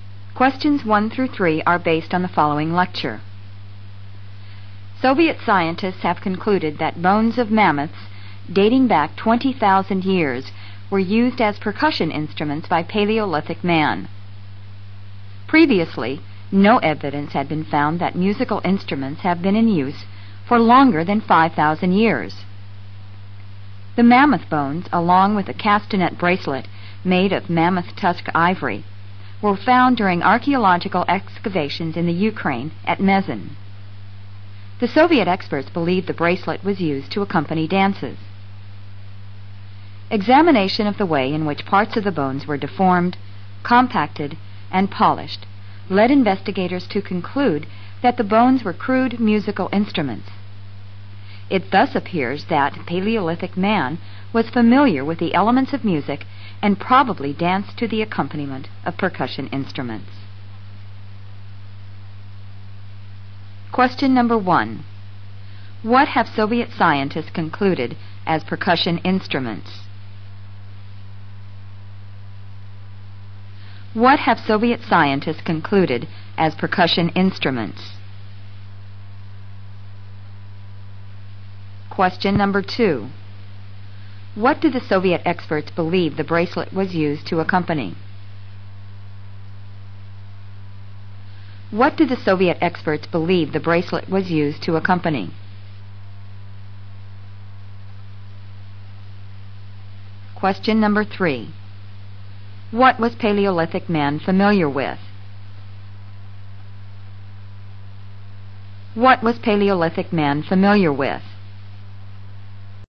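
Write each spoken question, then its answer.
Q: What have Soviet scientists concluded as percussion instruments?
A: Mammoth bones dating back 20,000 years

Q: What do the Soviet experts believe the bracelet was used to accompany?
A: Dances

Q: What was Paleolithic man familiar with?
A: The elements of music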